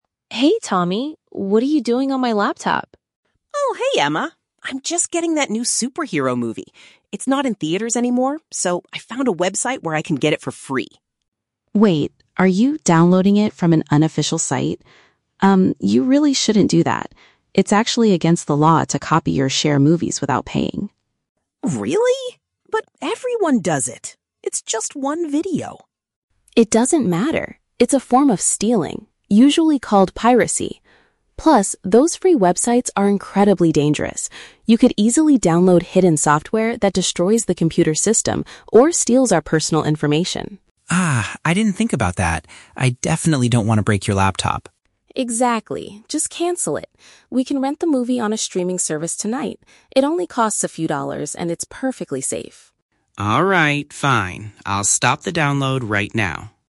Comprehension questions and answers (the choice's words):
Listen to the conversation between an older sister and her younger brother. Choose the correct answer (A, B, or C) for each question.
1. What is Tommy trying to do at the beginning of the conversation?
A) Go to the local cinema to watch a superhero film.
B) Buy a new movie from a popular website.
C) Download a film from the internet without paying.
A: Download a film from the internet without paying.

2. According to Emma, what is one major risk of using free movie websites?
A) The device might be harmed by dangerous programs.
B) He will have to pay a large fine to the website.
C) The police will immediately come to their house.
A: The device might be harmed by dangerous programs.

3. What is Emma's solution to watch the movie?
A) Ask a friend to give them a free copy.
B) Pay a small amount of money to view it legally.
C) Wait for the movie to return to the theaters.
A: Pay a small amount of money to view it legally.

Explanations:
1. Tommy says he is "getting that new superhero movie" and found a website to get it "for free." This means he is downloading it without paying. The Trap (A): Tommy mentions the word "theaters" (cinema), but he says the movie is "not in theaters anymore," so he cannot go there. Plausible but not mentioned (B): He is using a website, but he is not "buying" it because he explicitly says it is free.
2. Emma warns that he could download "hidden software that destroys the computer's system." Hidden software that destroys a computer is another way of saying dangerous programs.

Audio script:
Emma: Hey Tommy, what are you doing on my laptop?
Tommy: Oh, hey Emma. I'm just getting that new superhero movie. It's not in theaters anymore, so I found a website where I can get it for free.
Emma: Wait, are you downloading it from an unofficial site? Um, you really shouldn't do that. It's actually against the law to copy or share movies without paying.
Tommy: Really? But everyone does it! It's just one video.
Emma: It doesn't matter. It's a form of stealing, usually called piracy. Plus, those free websites are incredibly dangerous. You could easily download hidden software that destroys the computer's system or steals our personal information.
Tommy: Ah, I didn't think about that. I definitely don't want to break your laptop.
Emma: Exactly. Just cancel it. We can rent the movie on a streaming service tonight. It only costs a few dollars and it's perfectly safe.